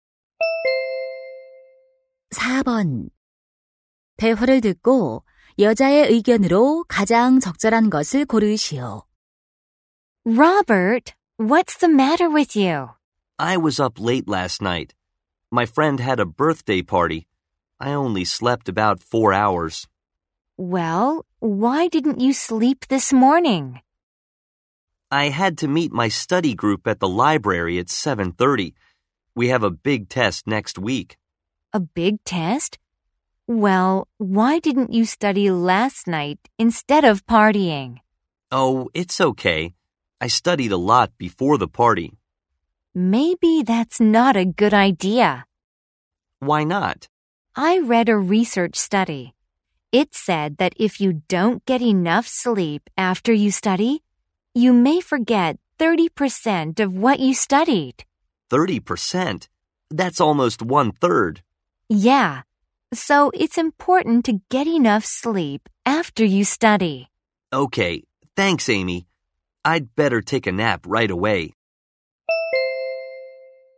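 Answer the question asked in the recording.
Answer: 공부한 후에는 충분히 자는 것이 중요하다.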